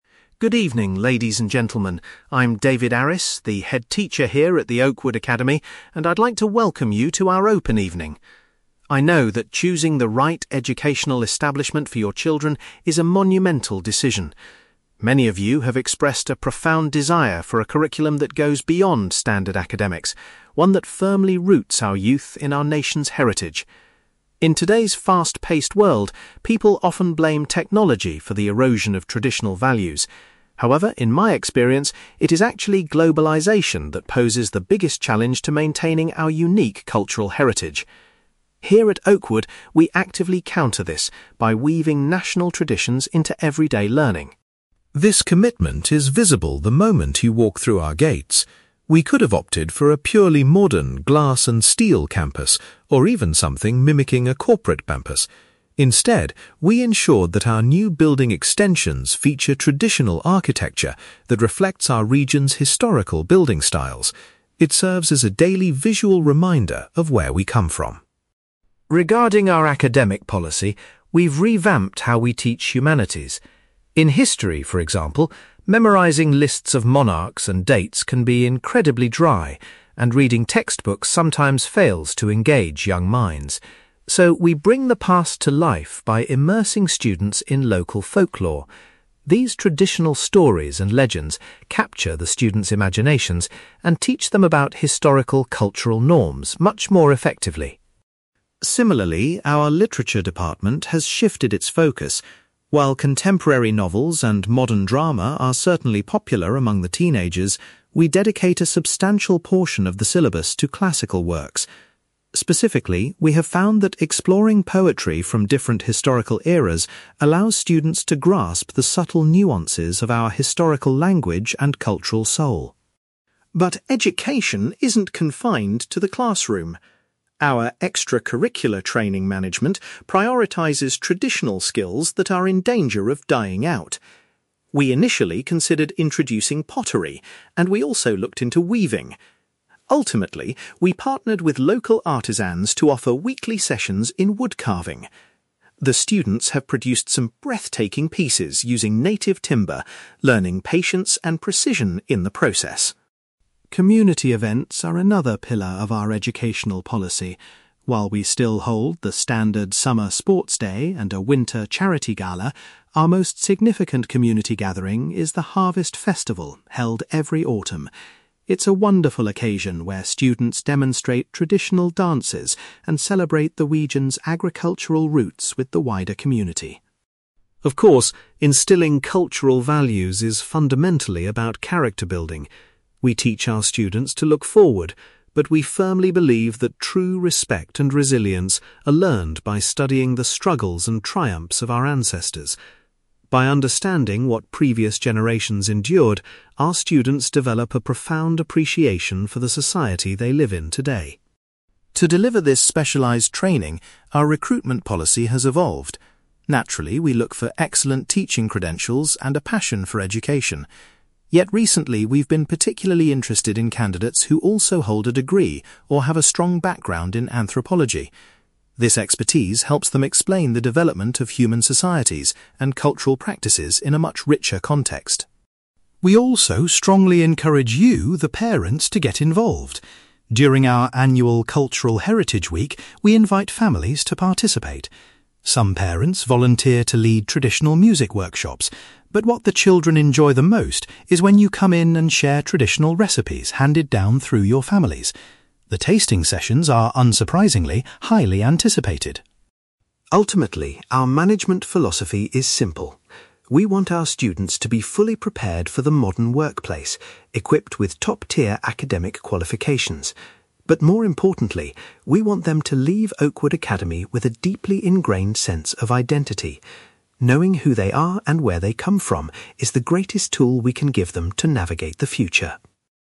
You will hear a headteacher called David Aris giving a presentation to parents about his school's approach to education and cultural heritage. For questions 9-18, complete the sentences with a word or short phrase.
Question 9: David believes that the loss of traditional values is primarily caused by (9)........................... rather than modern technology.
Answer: globalisation

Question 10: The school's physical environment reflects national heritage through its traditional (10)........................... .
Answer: architecture

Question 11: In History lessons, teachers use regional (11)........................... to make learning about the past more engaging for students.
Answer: folklore

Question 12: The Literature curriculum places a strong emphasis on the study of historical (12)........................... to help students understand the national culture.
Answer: poetry

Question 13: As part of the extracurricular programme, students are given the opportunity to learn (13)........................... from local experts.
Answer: wood carving

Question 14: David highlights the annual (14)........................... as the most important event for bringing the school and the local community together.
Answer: harvest festival

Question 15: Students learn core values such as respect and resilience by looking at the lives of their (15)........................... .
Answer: ancestors

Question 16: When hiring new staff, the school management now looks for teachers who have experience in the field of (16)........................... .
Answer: anthropology

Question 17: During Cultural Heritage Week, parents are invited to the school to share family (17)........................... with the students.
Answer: recipes

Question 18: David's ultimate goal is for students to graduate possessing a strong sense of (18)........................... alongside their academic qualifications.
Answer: identity

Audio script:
David: Good evening, ladies and gentlemen. I'm David Aris, the headteacher here at the Oakwood Academy, and I'd like to welcome you to our open evening. I know that choosing the right educational establishment for your children is a monumental decision. Many of you have expressed a profound desire for a curriculum that goes beyond standard academics, one that firmly roots our youth in our nation's heritage. In today's fast-paced world, people often blame technology for the erosion of traditional values. However, in my experience, it is actually globalisation that poses the biggest challenge to maintaining our unique cultural heritage. Here at Oakwood, we actively counter this by weaving national traditions into everyday learning.
This commitment is visible the moment you walk through our gates. We could have opted for a purely modern, glass-and-steel campus, or even something mimicking a corporate campus. Instead, we ensured that our new building extensions feature traditional architecture that reflects our region's historical building styles. It serves as a daily visual reminder of where we come from.
Regarding our academic policy, we've revamped how we teach humanities. In History, for example, memorising lists of monarchs and dates can be incredibly dry, and reading textbooks sometimes fails to engage young minds. So, we bring the past to life by immersing students in local folklore. These traditional stories and legends capture the students' imaginations and teach them about historical cultural norms much more effectively.
Similarly, our Literature department has shifted its focus. While contemporary novels and modern drama are certainly popular among the teenagers, we dedicate a substantial portion of the syllabus to classical works. Specifically, we have found that exploring poetry from different historical eras allows students to grasp the subtle nuances of our historical language and cultural soul.
But education isn't confined to the classroom. Our extracurricular training management prioritizes traditional skills that are in danger of dying out. We initially considered introducing pottery, and we also looked into weaving. Ultimately, we partnered with local artisans to offer weekly sessions in wood carving. The students have produced some breathtaking pieces using native timber, learning patience and precision in the process.
Community events are another pillar of our educational policy. While we still hold the standard summer sports day and a winter charity gala, our most significant community gathering is the harvest festival held every autumn. It's a wonderful occasion where students demonstrate traditional dances and celebrate the region's agricultural roots with the wider community.
Of course, instilling cultural values is fundamentally about character building. We teach our students to look forward, but we firmly believe that true respect and resilience are learned by studying the struggles and triumphs of our ancestors. By understanding what previous generations endured, our students develop a profound appreciation for the society they live in today.
To deliver this specialized training, our recruitment policy has evolved. Naturally, we look for excellent teaching credentials and a passion for education. Yet, recently, we've been particularly interested in candidates who also hold a degree or have a strong background in anthropology. This expertise helps them explain the development of human societies and cultural practices in a much richer context.
We also strongly encourage you, the parents, to get involved. During our annual Cultural Heritage Week, we invite families to participate. Some parents volunteer to lead traditional music workshops, but what the children enjoy the most is when you come in and share traditional recipes handed down through your families. The tasting sessions are, unsurprisingly, highly anticipated!
Ultimately, our management philosophy is simple. We want our students to be fully prepared for the modern workplace, equipped with top-tier academic qualifications. But more importantly, we want them to leave Oakwood Academy with a deeply ingrained sense of identity. Knowing who they are and where they come from is the greatest tool we can give them to navigate the future.

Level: B2